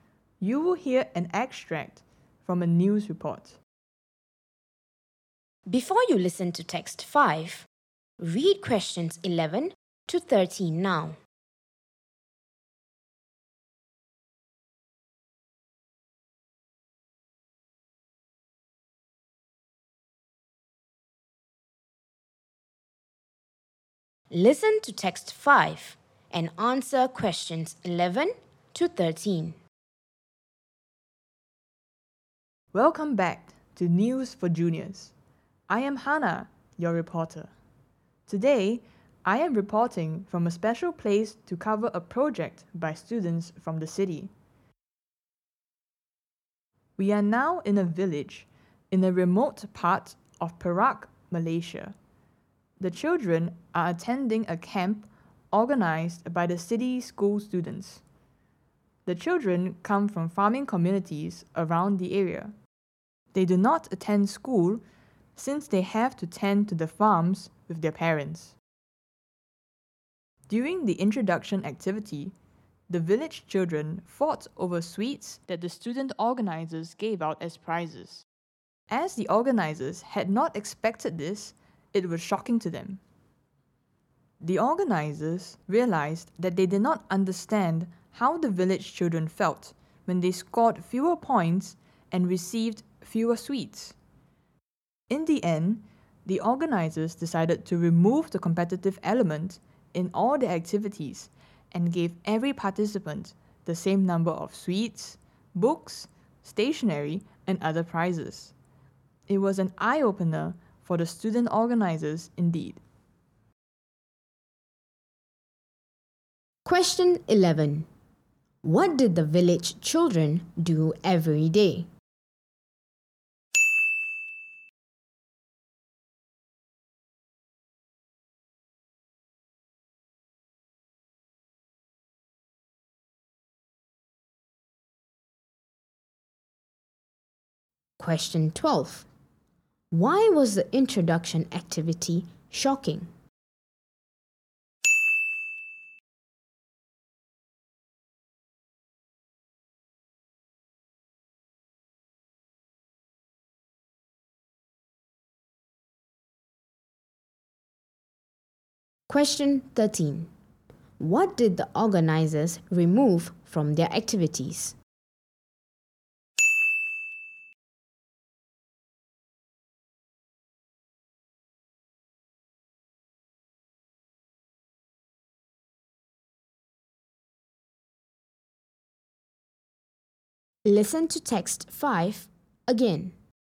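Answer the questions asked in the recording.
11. They tended to the farms with their parents.
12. The village children fought over the sweets given as prizes.
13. The competitive element.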